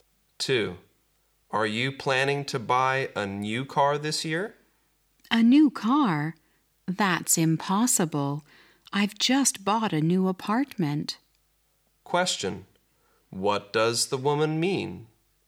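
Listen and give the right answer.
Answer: She can't buy a new car because she just bought an apartment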